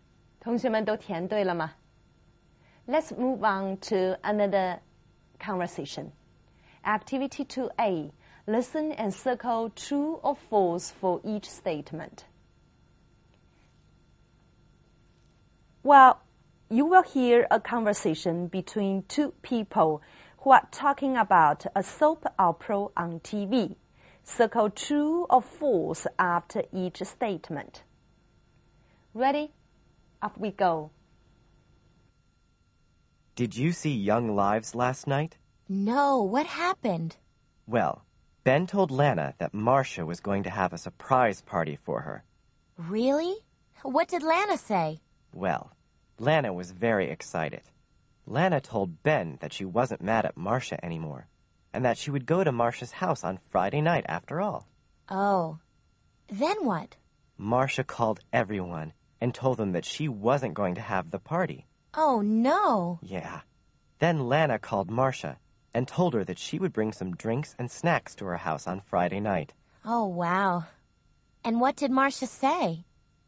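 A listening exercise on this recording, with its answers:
2a Listen and circle true or false for each statement.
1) Ben told Lana that Marcia was going to have a surprise party for her.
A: True

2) Lana said she wasn't mad at Marcia anymore.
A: True

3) Lana said that she wouldn't go to Marcia's house on Friday night.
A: False

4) Marcia called everyone and told them she wasn't going to have the party.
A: True

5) Lana told Marcia she would bring some books to her house on Friday night.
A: False

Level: 八年级下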